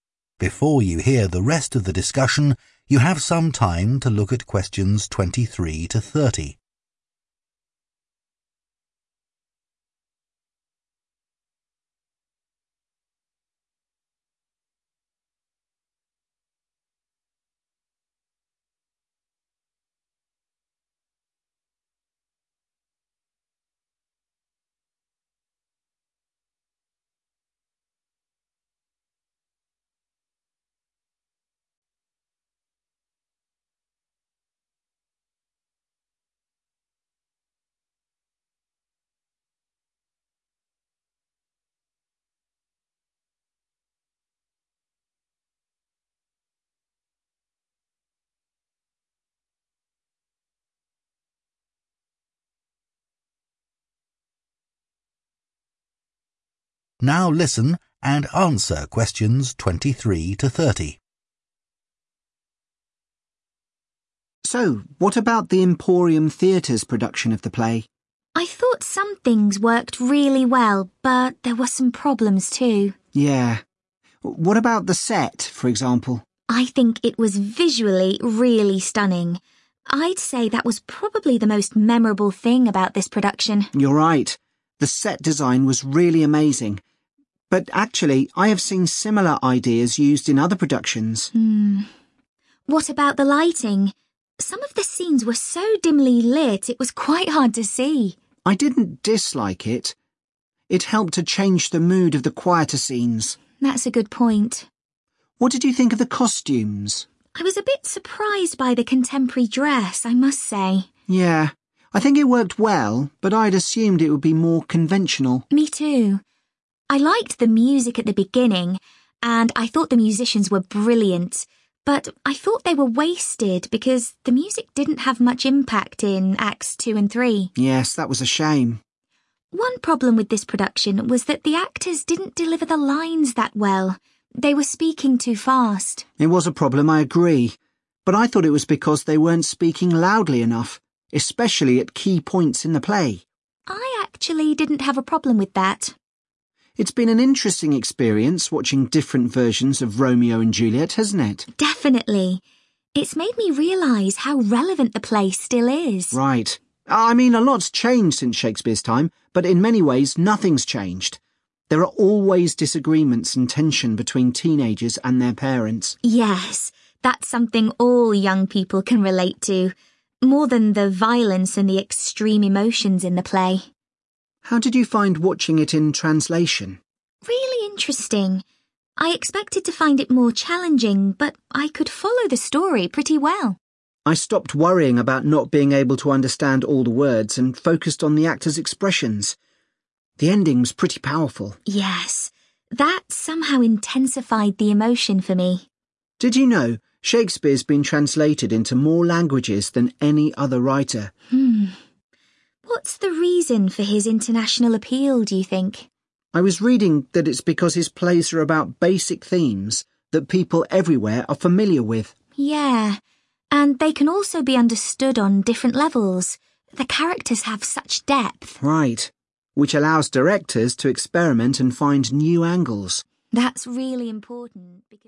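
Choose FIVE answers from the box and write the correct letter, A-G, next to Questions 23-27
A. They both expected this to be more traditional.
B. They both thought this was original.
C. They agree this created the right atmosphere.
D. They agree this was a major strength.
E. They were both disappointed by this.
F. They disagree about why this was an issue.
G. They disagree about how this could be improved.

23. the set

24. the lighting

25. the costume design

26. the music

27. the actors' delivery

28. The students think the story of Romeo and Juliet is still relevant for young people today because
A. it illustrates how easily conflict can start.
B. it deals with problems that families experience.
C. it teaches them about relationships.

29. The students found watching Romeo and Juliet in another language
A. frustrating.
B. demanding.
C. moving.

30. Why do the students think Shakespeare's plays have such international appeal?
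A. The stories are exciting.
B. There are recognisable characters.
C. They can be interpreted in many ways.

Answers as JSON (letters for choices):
{"23": "D", "24": "C", "25": "A", "26": "E", "27": "F", "28": "B", "29": "C", "30": "C"}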